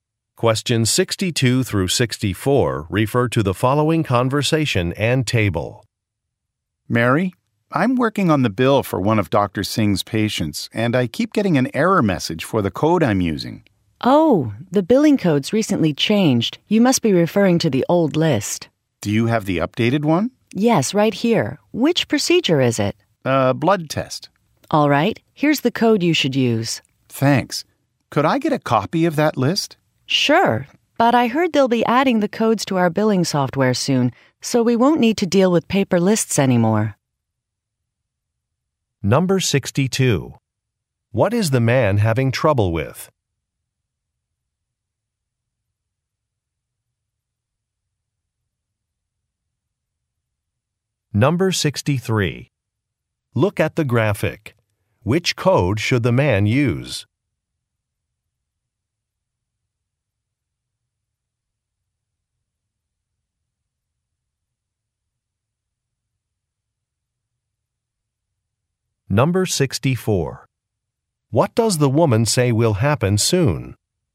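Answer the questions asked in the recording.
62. A billing code
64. Codes will be added to the billing software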